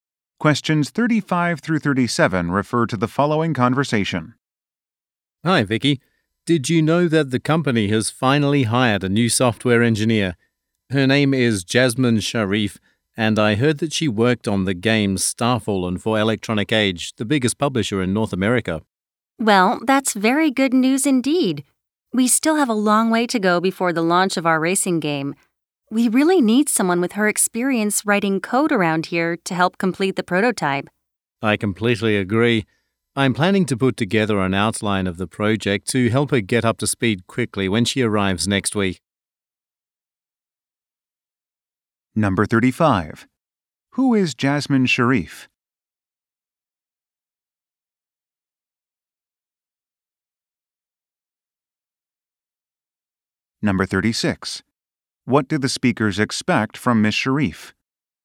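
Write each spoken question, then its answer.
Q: Who is Jasmine Sharif?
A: A new software engineer

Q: What do the speakers expect from Ms. Sharif?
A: Help complete the prototype by writing code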